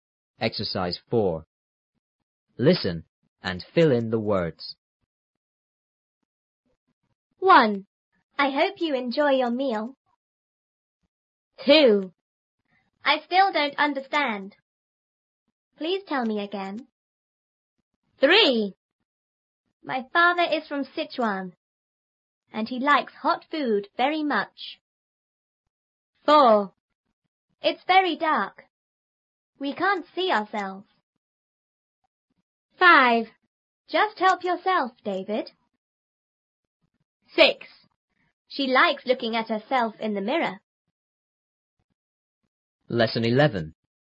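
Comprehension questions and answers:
Listen and fill in the words.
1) I hope you___your___.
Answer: enjoy; meal

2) I___don't understand.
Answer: still

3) and he likes___ ___very much.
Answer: hot food

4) It's very___.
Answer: dark

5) We can't see___.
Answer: ourselves

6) Just___ ___,David.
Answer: help yourself

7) She likes looking at___in the mirror.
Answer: herself

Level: 初中英语广州版3B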